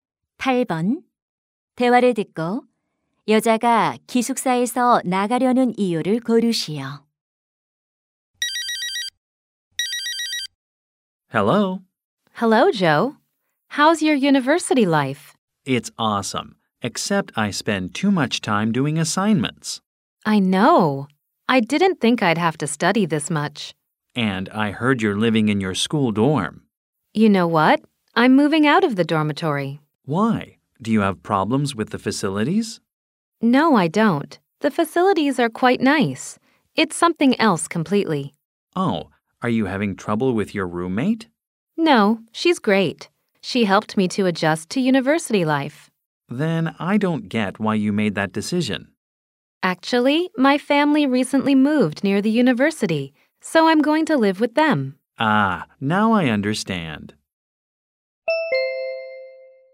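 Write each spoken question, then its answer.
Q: 대화를 듣고 여자가 기숙사에서 나가려는 이유를 고르시오.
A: 가족이 대학 근처로 이사해서 함께 살려고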